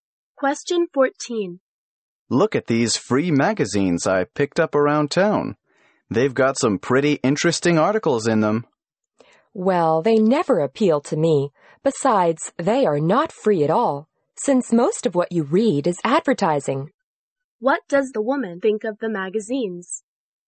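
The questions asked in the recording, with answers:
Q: What does the woman think of the magazines?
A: They are mostly advertising and not worth reading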